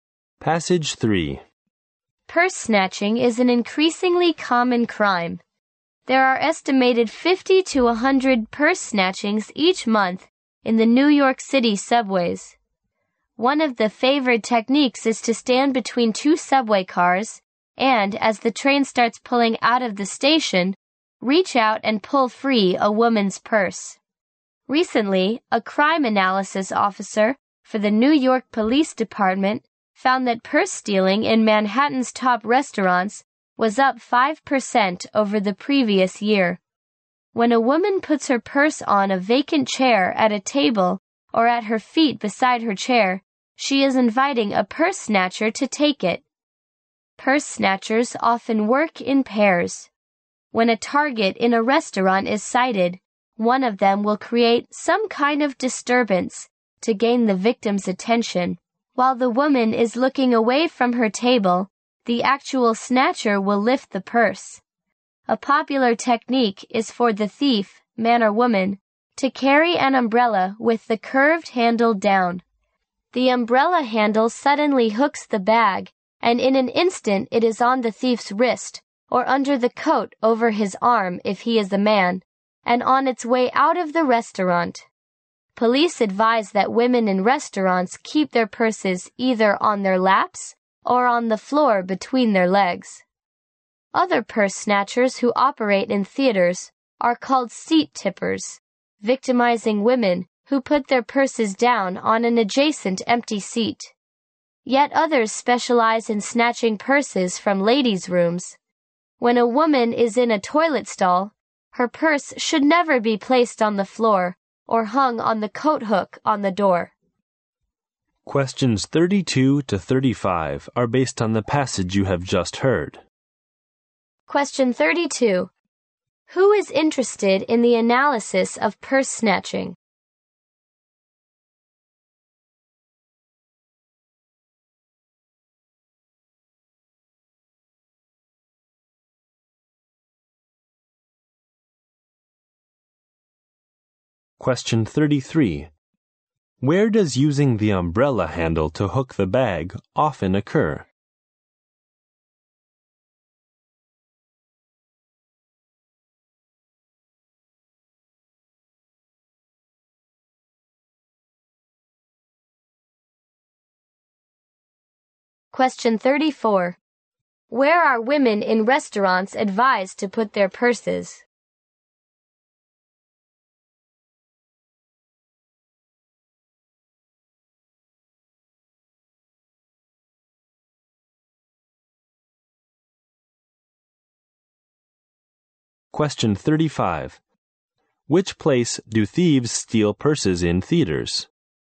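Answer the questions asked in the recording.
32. A crime analysis officer of the New York Police Department.
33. In restaurants.
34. On their laps or on the floor between their legs.
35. From an empty seat next to the woman.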